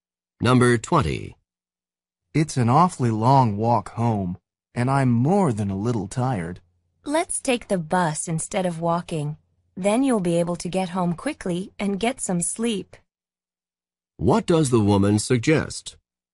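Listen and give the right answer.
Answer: Taking the bus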